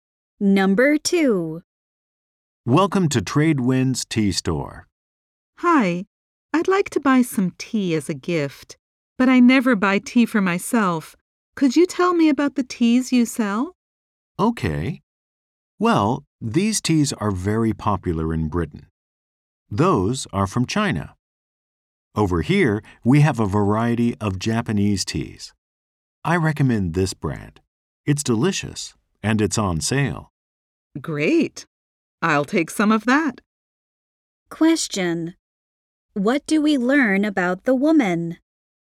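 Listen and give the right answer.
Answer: She is buying tea as a gift and never buys tea for herself.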